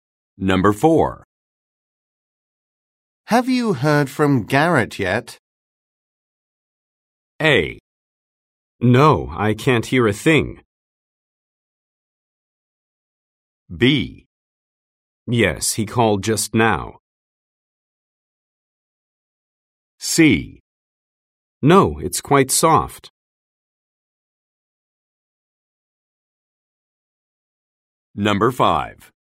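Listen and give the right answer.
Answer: B: Yes, he called just now.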